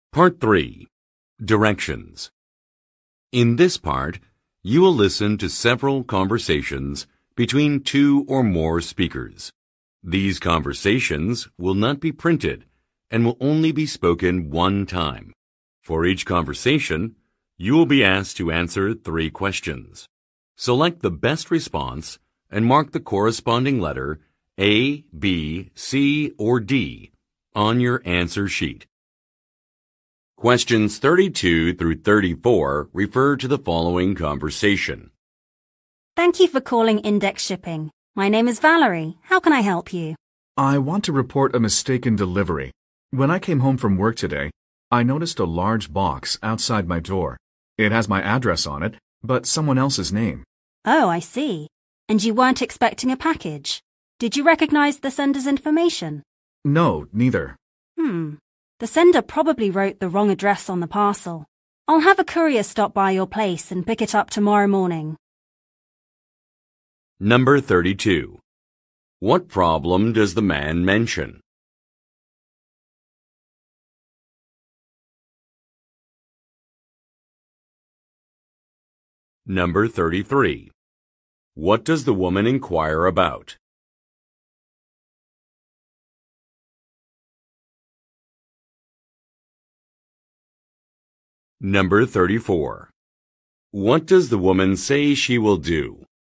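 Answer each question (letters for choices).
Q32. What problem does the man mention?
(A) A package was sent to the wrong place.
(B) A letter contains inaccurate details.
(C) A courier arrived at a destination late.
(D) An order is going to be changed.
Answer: A

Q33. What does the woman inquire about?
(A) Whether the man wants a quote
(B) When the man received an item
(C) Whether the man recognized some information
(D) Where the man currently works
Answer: C

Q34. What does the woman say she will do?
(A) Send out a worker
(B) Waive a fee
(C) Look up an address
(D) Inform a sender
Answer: A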